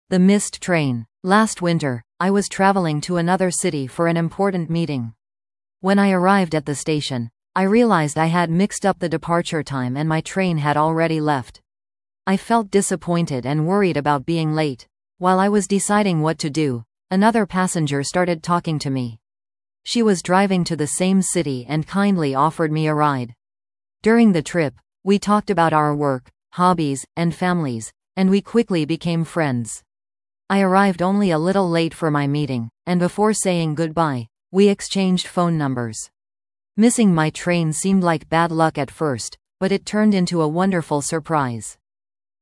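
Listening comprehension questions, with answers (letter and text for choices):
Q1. Why did the speaker miss the train?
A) The train was canceled.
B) The departure time was mistaken.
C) The station was crowded.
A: B) The departure time was mistaken.

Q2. How did the speaker reach the destination?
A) By bus.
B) By another train.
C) By riding with another passenger.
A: C) By riding with another passenger.

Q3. What positive thing happened?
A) The meeting ended early.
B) The speaker made a new friend.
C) The speaker won a prize.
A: B) The speaker made a new friend.

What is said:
The Missed Train
Last winter, I was traveling to another city for an important meeting. When I arrived at the station, I realized I had mixed up the departure time and my train had already left. I felt disappointed and worried about being late. While I was deciding what to do, another passenger started talking to me. 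She was driving to the same city and kindly offered me a ride. During the trip, we talked about our work, hobbies, and families, and we quickly became friends. I arrived only a little late for my meeting, and before saying goodbye, we exchanged phone numbers. Missing my train seemed like bad luck at first, but it turned into a wonderful surprise.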